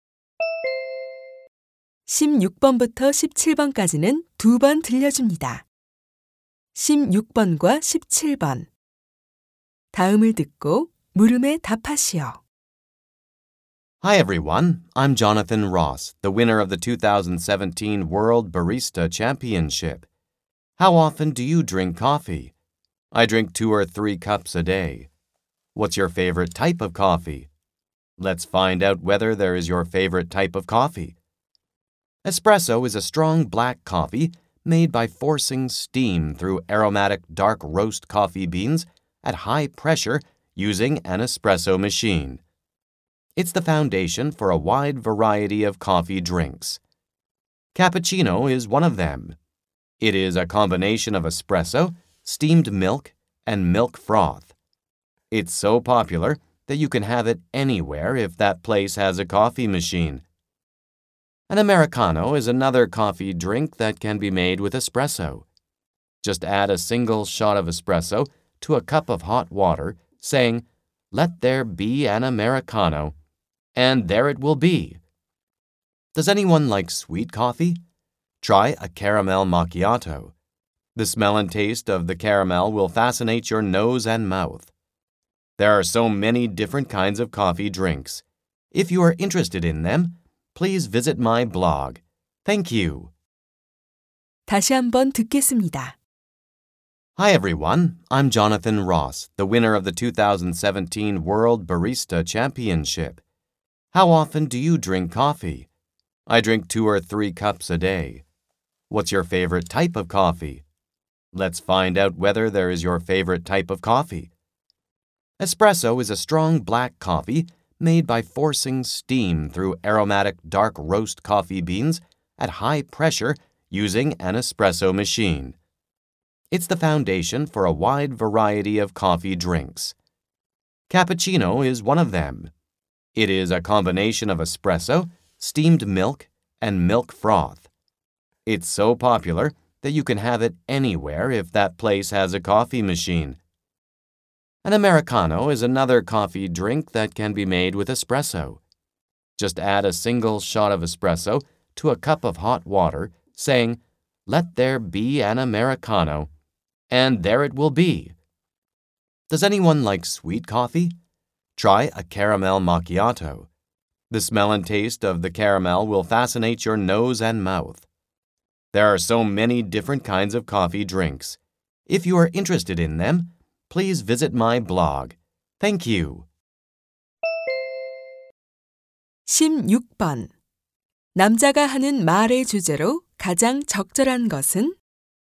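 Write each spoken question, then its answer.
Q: 남자가 하는 말의 주제로 가장 적절한 것은?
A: 에스프레소로 만드는 다양한 커피 음료의 종류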